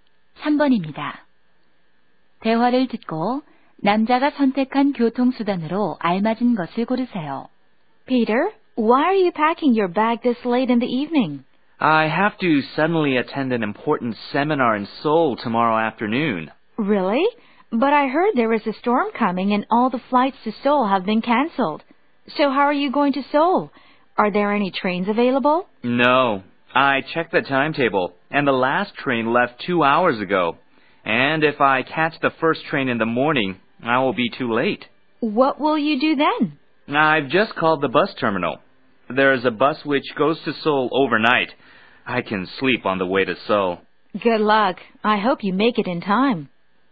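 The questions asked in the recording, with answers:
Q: 대화를 듣고 남자가 선택한 교통수단으로 알맞은 것을 고르세요.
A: 버스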